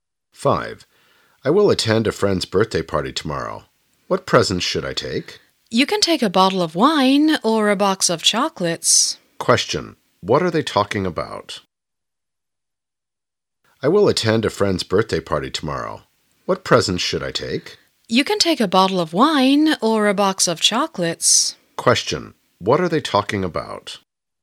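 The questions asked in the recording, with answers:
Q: What are they talking about?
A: Presents for a birthday party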